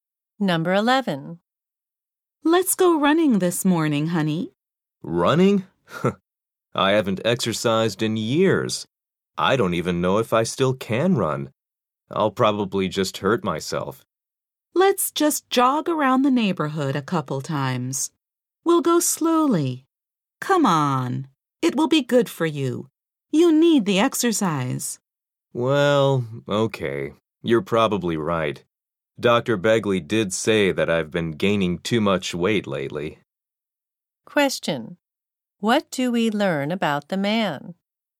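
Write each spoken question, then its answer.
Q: What do we learn about the man?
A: He has been gaining too much weight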